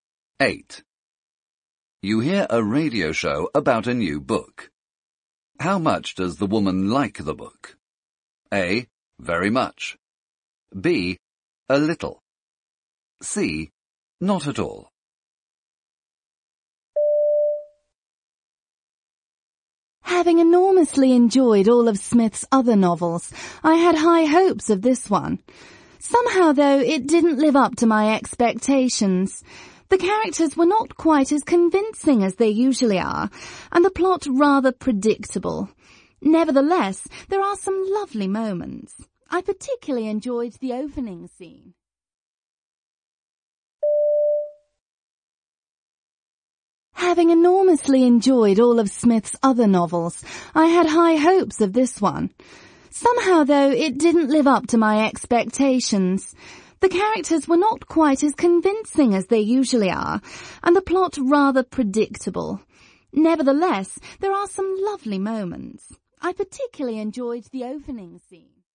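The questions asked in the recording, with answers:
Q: How much does the woman like the book?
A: B: A little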